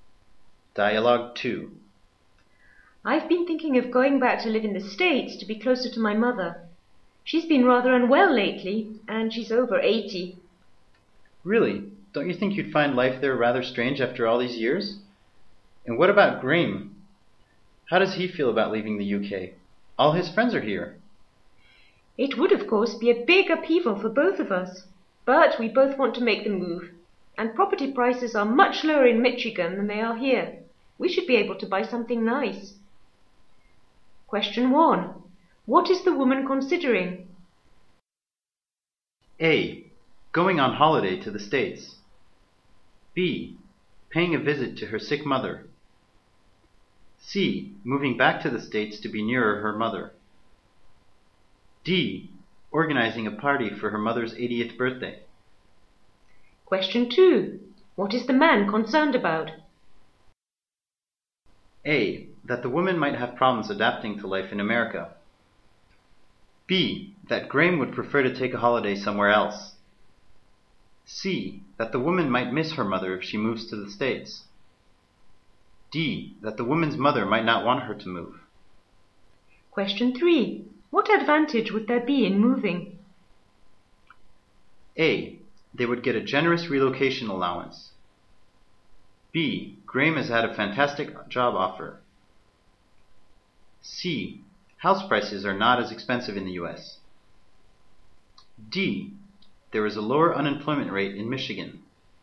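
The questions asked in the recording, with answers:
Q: What is the woman considering?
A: C: Moving back to the States to be nearer her mother.

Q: What is the man concerned about?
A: A: That the woman might have problems adapting to life in America.

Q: What advantage would there be in moving?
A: C: House prices are not as expensive in the U.S.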